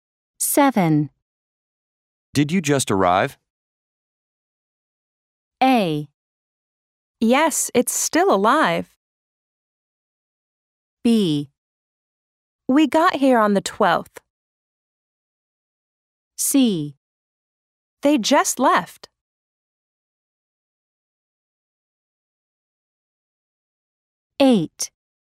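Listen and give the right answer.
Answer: B: We got here on the 12th.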